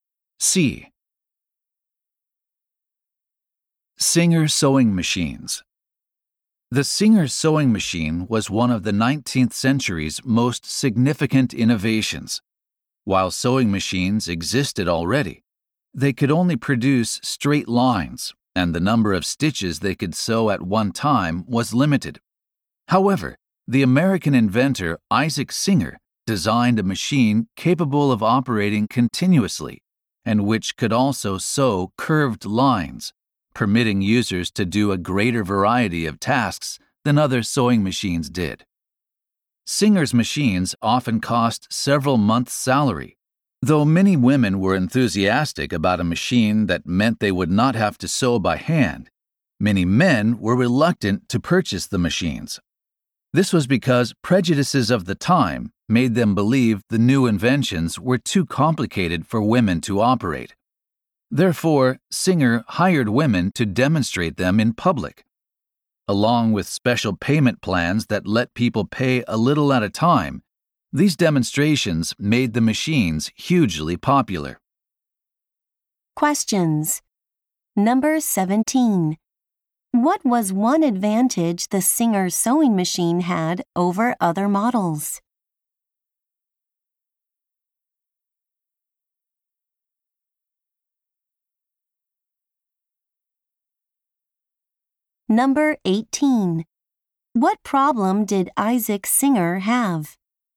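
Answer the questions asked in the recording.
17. It could sew curved lines and run continuously
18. Men thought the machines were too complicated for women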